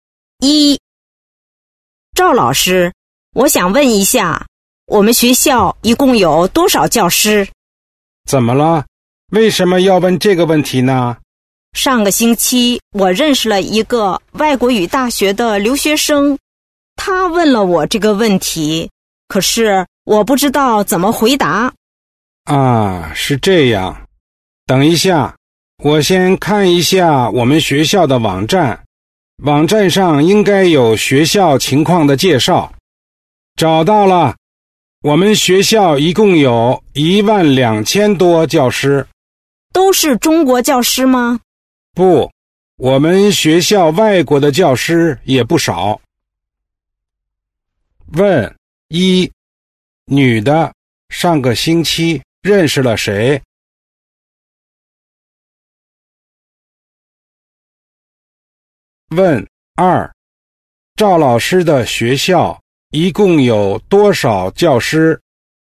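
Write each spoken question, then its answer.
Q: 赵老师的学校一共有多少教师?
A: 12000多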